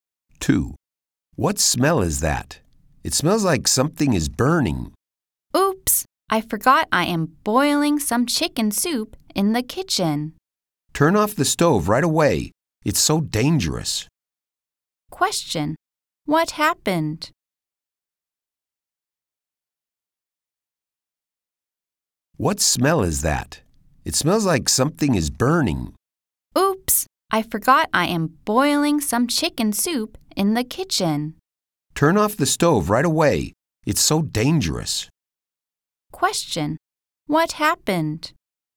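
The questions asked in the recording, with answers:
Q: What happened?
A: The woman forgot the chicken soup boiling on the stove, and something was burning.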